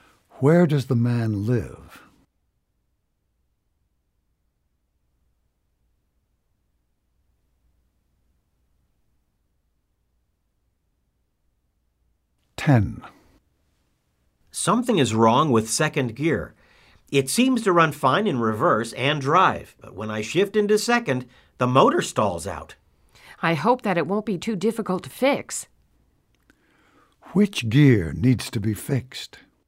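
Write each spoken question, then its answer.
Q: Which gear needs to be fixed?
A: Second gear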